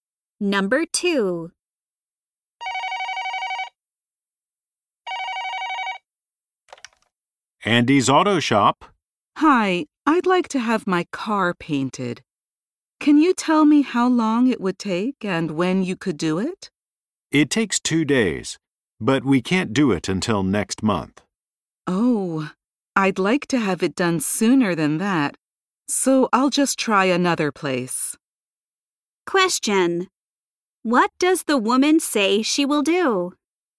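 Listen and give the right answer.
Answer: Try another place to get her car painted.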